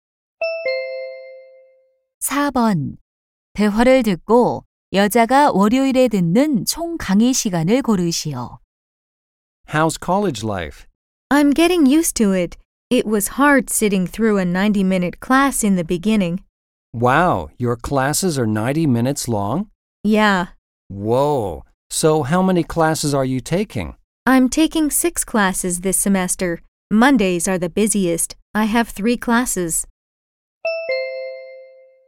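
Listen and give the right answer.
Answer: 270분 (4시간 30분)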